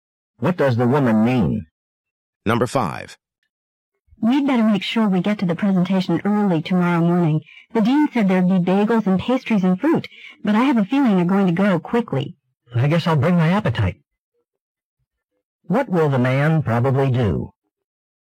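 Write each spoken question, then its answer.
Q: What will the man probably do?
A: Arrive early and eat breakfast at the presentation.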